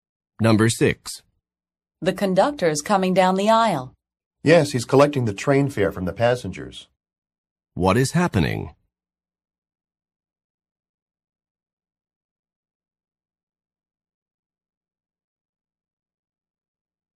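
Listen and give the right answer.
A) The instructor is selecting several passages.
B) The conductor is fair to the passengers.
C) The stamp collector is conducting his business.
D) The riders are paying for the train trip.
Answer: D) The riders are paying for the train trip.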